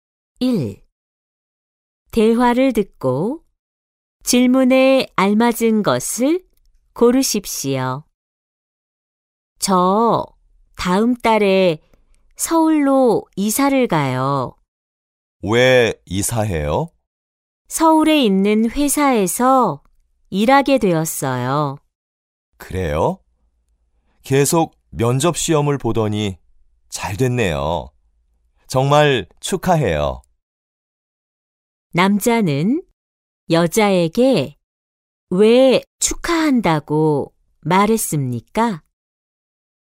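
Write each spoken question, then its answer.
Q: 남자는 여자에게 왜 축하한다고 말했습니까?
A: 여자가 서울에 있는 회사에 취직해서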